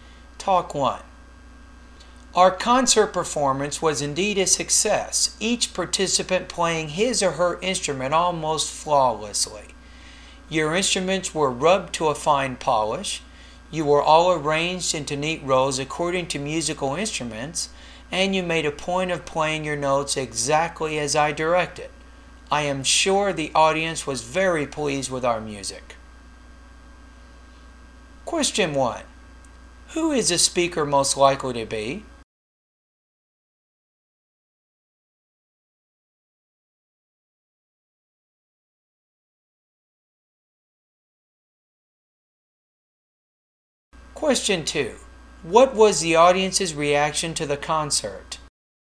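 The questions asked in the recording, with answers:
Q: Who is the speaker most likely to be?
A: The conductor of the orchestra

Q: What was the audience's reaction to the concert?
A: They were very pleased with the music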